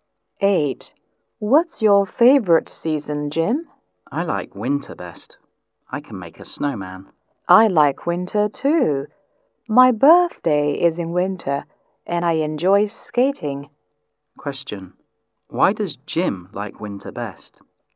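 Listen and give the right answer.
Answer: He can make a snowman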